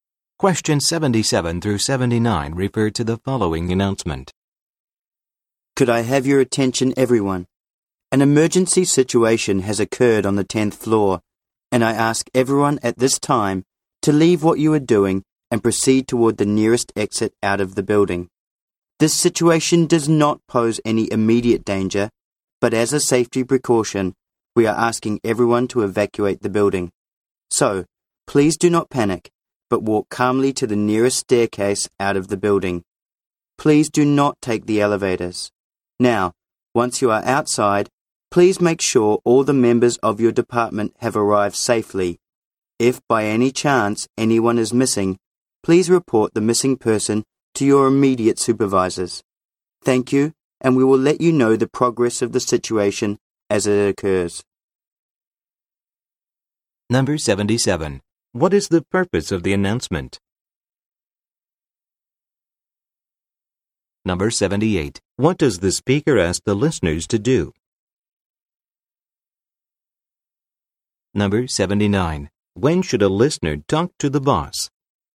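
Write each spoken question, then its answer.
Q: What is the purpose of the announcement?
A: To ask everyone to evacuate the building because of an emergency

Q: What does the speaker ask the listeners to do?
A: Walk calmly to the nearest staircase and leave the building, without using the elevators

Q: When should a listener talk to the boss?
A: If someone is missing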